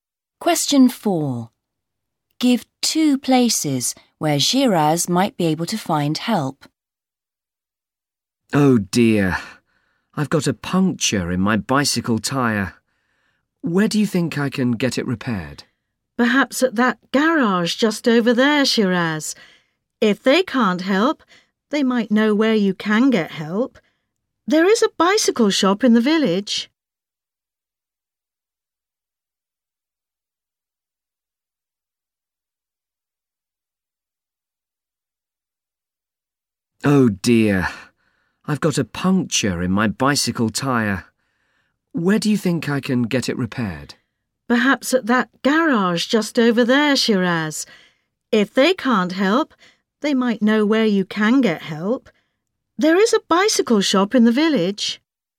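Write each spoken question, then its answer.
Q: Give two places where Shiraz might be able to find help.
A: The garage nearby and the bicycle shop in the village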